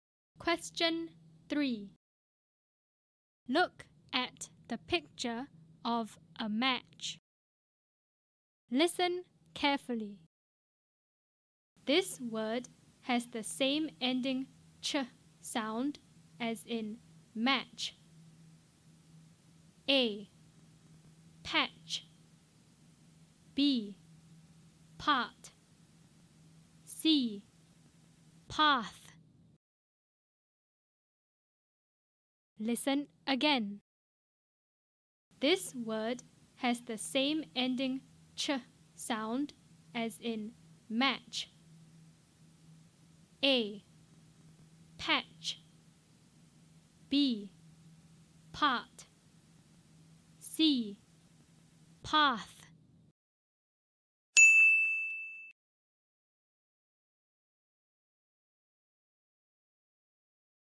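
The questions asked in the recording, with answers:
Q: This word has the same ending ch sound as in match.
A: A: Patch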